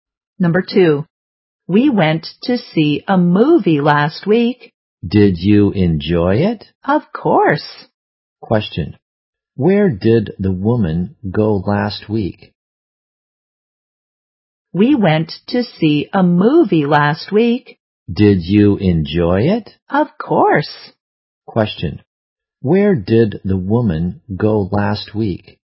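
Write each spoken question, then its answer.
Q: Where did the woman go last week?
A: To the cinema (to see a movie).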